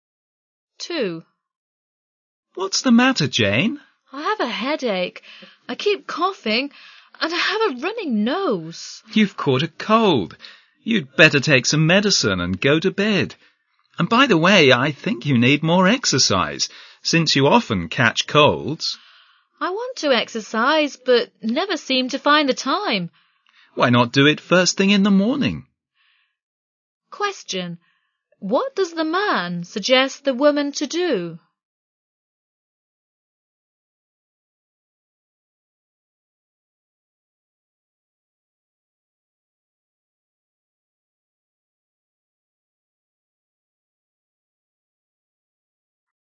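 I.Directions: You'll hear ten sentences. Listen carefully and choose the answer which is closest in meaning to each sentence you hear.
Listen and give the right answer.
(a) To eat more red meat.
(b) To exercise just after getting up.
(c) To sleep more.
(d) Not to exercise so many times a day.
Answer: (b) To exercise just after getting up.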